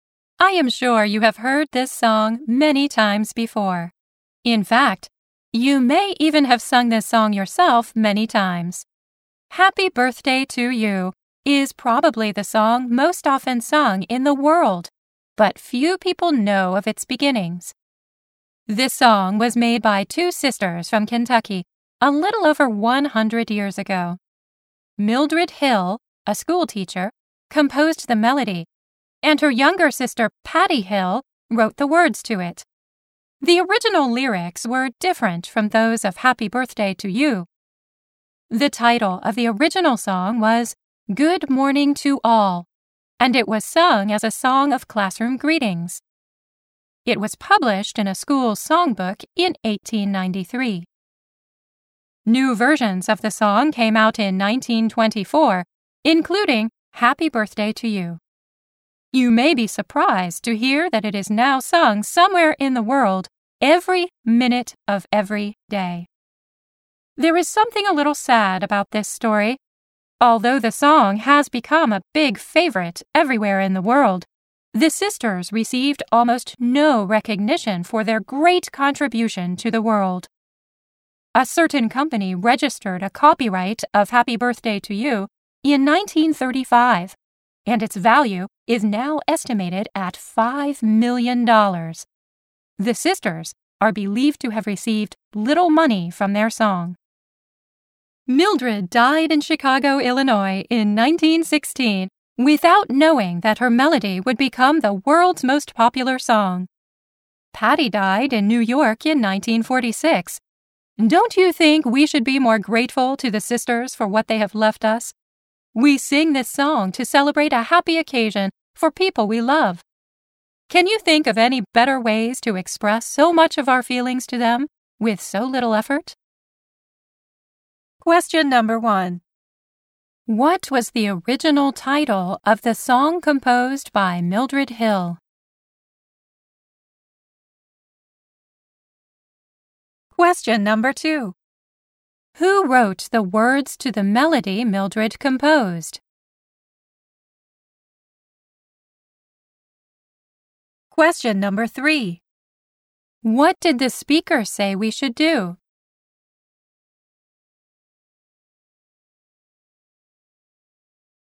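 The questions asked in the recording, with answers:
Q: What was the original title of the song composed by Mildred Hill?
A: Good Morning to All

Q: Who wrote the words to the melody Mildred composed?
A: Her younger sister, Patty Hill

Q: What did the speaker say we should do?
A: We should be more grateful to the sisters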